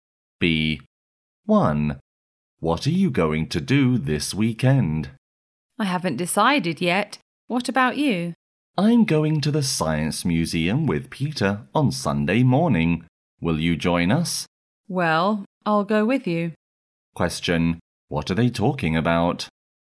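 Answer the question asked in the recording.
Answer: Their plans for the weekend (going to the Science Museum)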